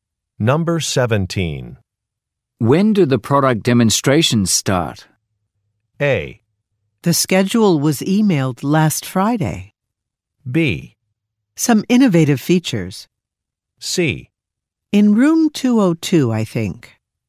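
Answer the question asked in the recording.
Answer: A: The schedule was emailed last Friday.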